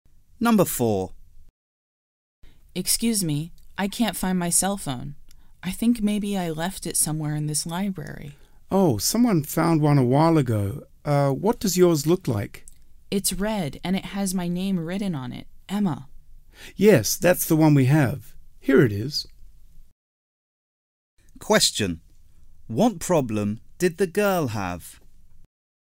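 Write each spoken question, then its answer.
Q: What problem did the girl have?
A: She lost her cell phone.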